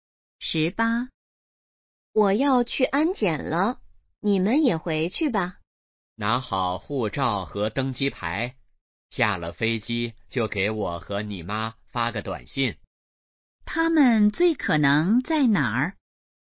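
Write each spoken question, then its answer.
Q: 他们最可能在哪儿?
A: 机场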